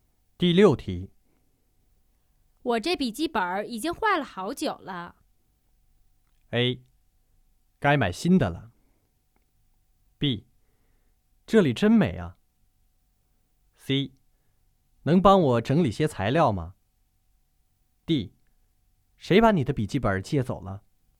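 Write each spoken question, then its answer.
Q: 我这笔记本已经坏了好久了。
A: A: 该买新的了。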